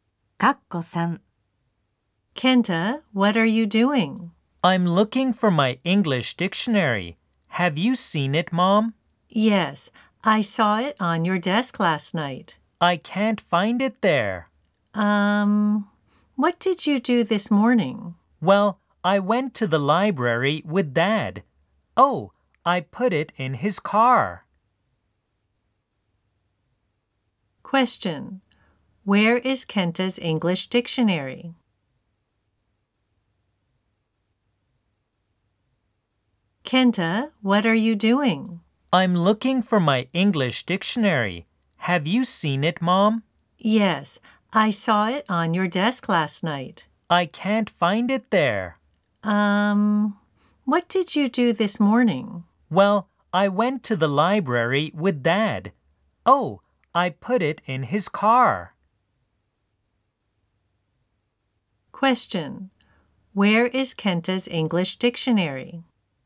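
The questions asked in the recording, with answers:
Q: Question: Where is Kenta's English dictionary?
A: In his dad's car.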